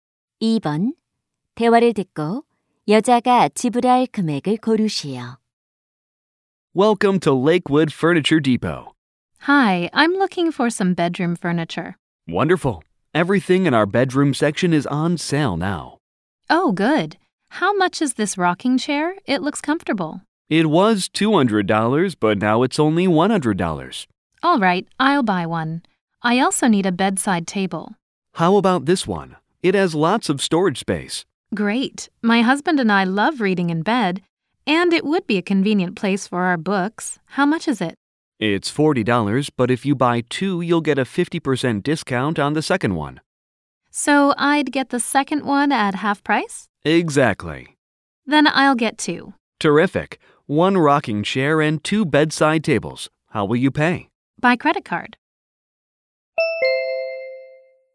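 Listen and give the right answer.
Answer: $160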